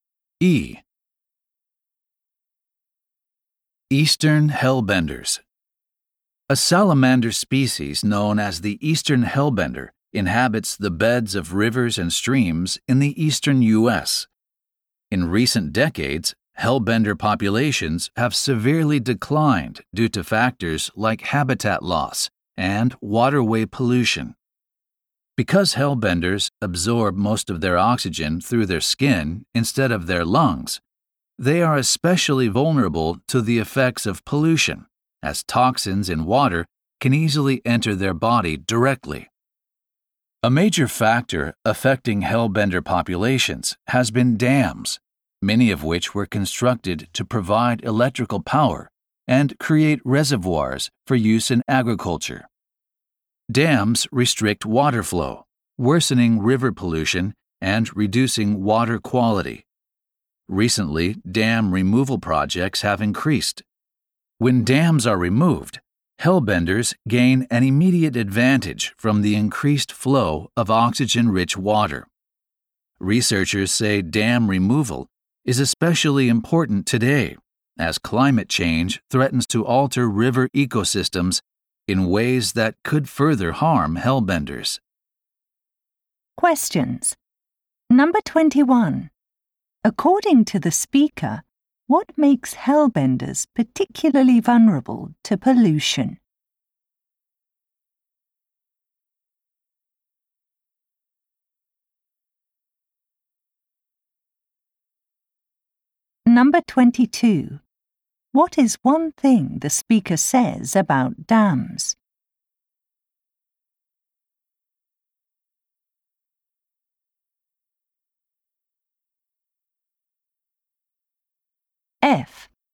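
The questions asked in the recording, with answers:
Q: According to the speaker, what makes hellbenders particularly vulnerable to pollution?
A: They absorb most of their oxygen through their skin.

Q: What is one thing the speaker says about dams?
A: They restrict water flow, which worsens pollution and lowers water quality.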